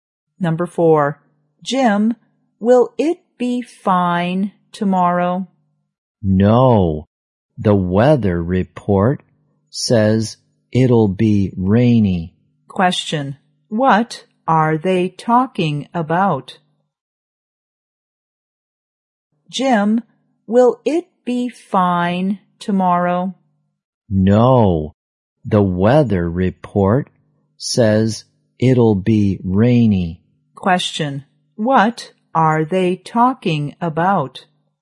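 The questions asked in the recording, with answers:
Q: Question. What are they talking about?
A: The weather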